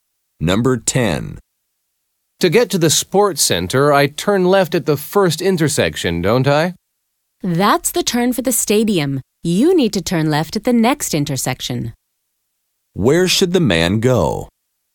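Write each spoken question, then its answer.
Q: Where should the man go?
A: Turn left at the second intersection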